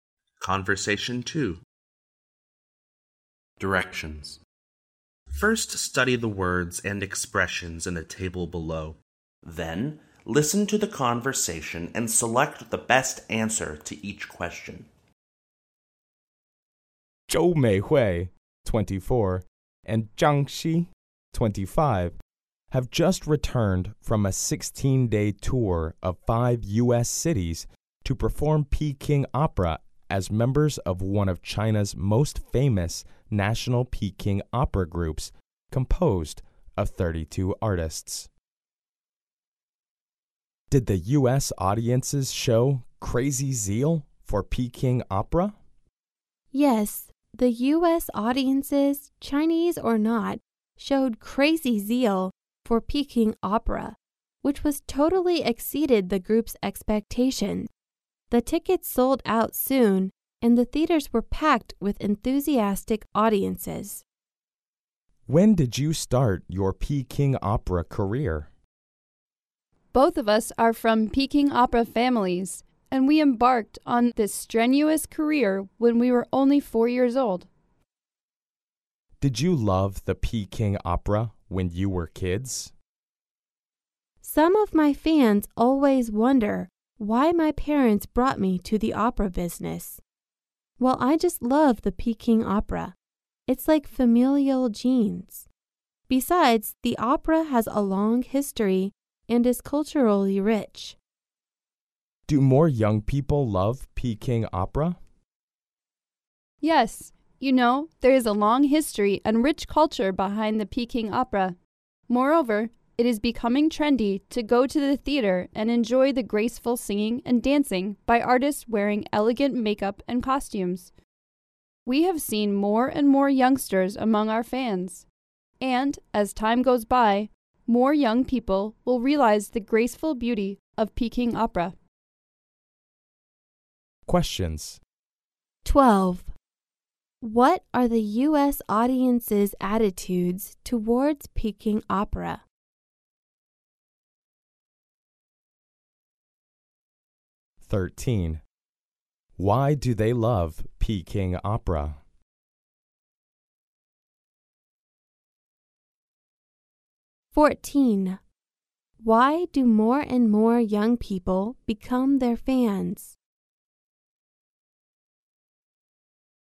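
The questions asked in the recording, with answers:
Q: What are the U.S. audience's attitudes towards Peking opera?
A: They showed crazy zeal for it

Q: Why do more and more young people become their fans?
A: It is becoming trendy to go to the theater to enjoy Peking opera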